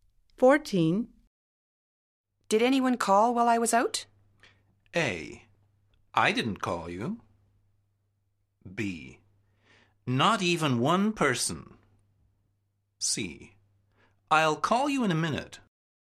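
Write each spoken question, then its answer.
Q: Did anyone call while I was out?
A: B: Not even one person.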